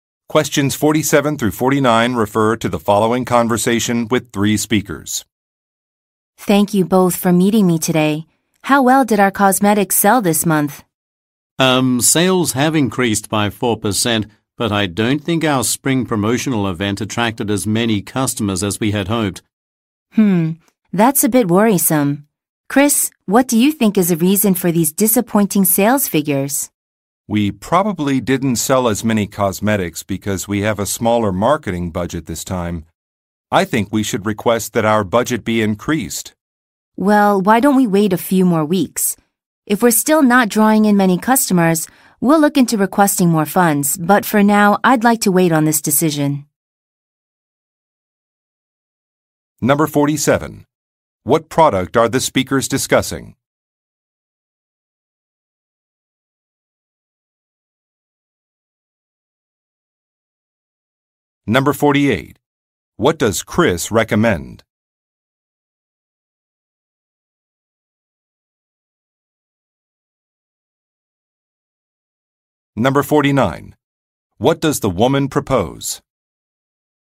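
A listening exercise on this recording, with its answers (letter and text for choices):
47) What product are the speakers discussing?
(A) Stationery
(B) Cosmetics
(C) Computers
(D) Beverages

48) What does Chris recommend?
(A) Offering discounts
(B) Recruiting more workers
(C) Updating a Website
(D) Adjusting a budget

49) What does the woman propose?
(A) Expanding store space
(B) Delaying a decision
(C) Extending business hours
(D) Distributing a questionnaire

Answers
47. (B) Cosmetics
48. (D) Adjusting a budget
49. (B) Delaying a decision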